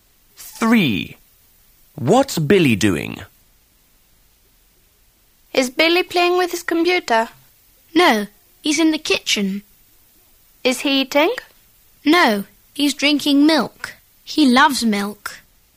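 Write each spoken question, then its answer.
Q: What's Billy doing?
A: Drinking milk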